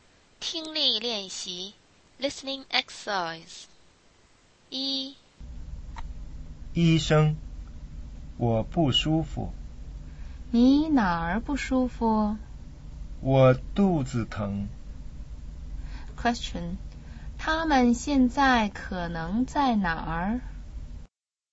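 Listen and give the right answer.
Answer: 医院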